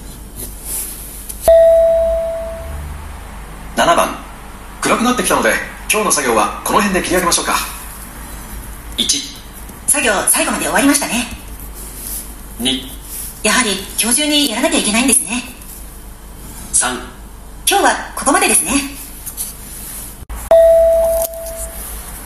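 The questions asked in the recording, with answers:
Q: 暗くなってきたので今日の作業はこの辺で切り上げましょうか。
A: 3: 今日はここまでですね。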